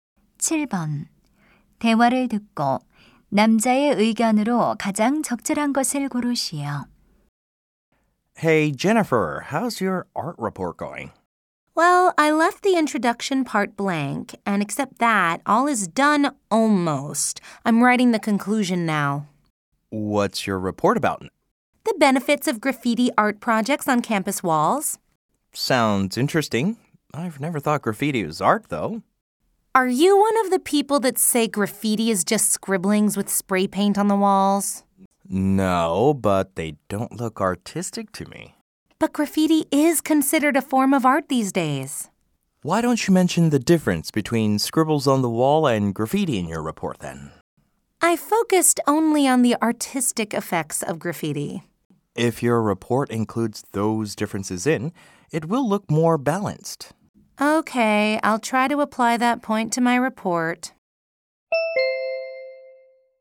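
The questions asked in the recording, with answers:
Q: 대화를 듣고 남자의 의견으로 가장 적절한 것을 고르시오.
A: 보고서에 낙서와 그래피티의 차이를 포함하면 더 균형 잡힌 보고서가 된다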